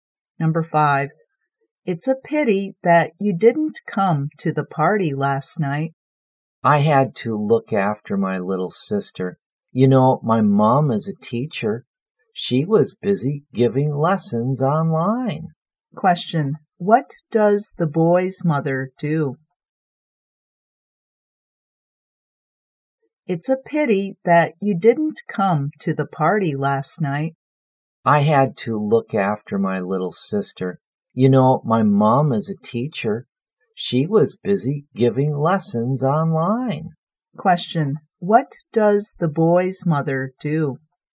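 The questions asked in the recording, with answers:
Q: what does the boy's mother do?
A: She is a teacher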